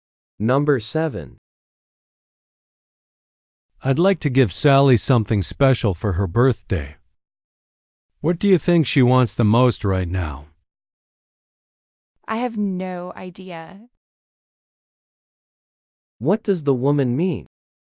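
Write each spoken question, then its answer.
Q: What does the woman mean?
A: She doesn't know what Sally wants.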